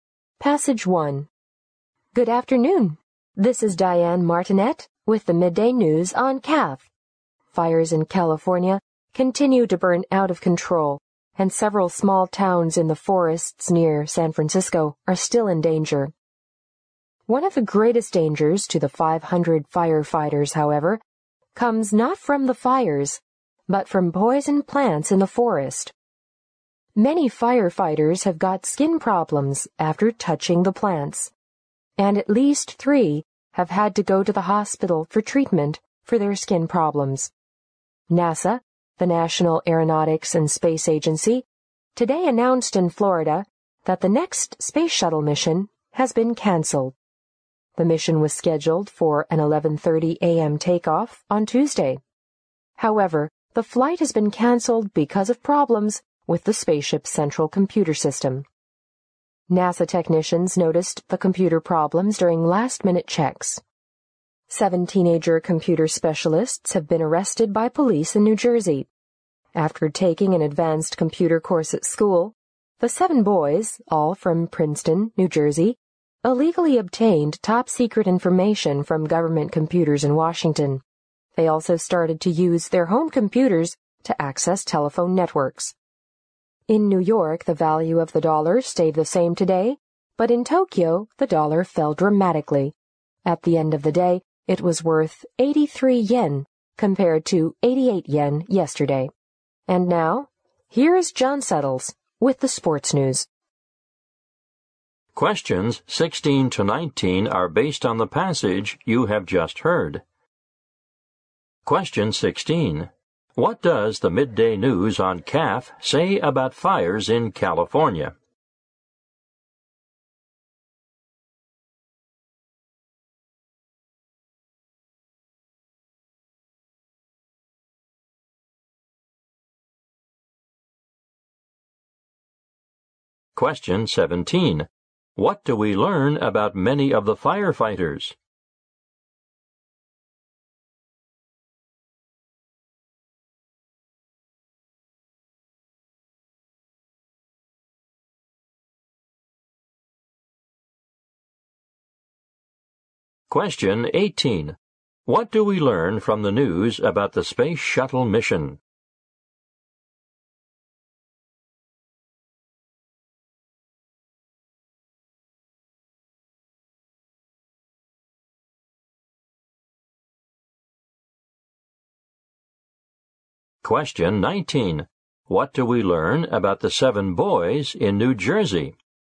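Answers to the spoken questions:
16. They are still burning out of control and several small towns are in danger
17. They got skin problems from touching poison plants
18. It was canceled because of problems with the central computer system
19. They illegally obtained top-secret information from government computers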